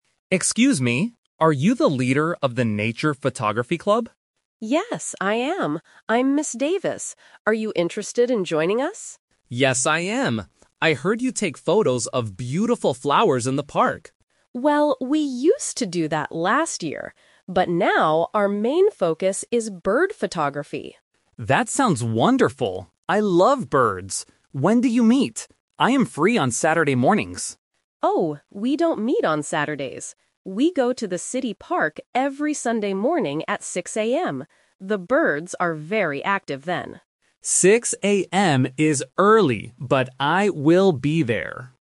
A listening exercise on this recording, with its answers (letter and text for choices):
Listen to a student talking to a club leader. Choose the correct answer (A, B, or C).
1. What does the club take photos of this year?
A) Flowers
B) Birds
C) Insects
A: B) Birds

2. When does the photography club meet?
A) Saturday morning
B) Sunday morning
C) Sunday afternoon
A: B) Sunday morning

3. Where do they go to take photos?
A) The school garden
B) The zoo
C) The city park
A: C) The city park

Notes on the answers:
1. Ms. Davis clearly states: "...now, our main focus is bird photography."
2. Ms. Davis says: "We go to the city park every Sunday morning at 6:00 AM."
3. Ms. Davis gives the location when she says: "We go to the city park every Sunday morning..."

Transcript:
Liam: Excuse me, are you the leader of the Nature Photography Club?
Ms. Davis: Yes, I am. I'm Ms. Davis. Are you interested in joining us?
Liam: Yes, I am. I heard you take photos of beautiful flowers in the park.
Davis: Well, we used to do that last year. But now, our main focus is bird photography.
Liam: That sounds wonderful. I love birds! When do you meet? I am free on Saturday mornings.
Davis: Oh, we don't meet on Saturdays. We go to the city park every Sunday morning at 6:00 AM. The birds are very active then.
Liam: 6:00 AM is early, but I will be there!